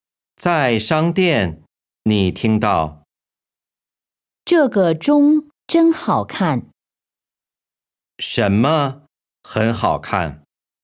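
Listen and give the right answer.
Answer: 这个钟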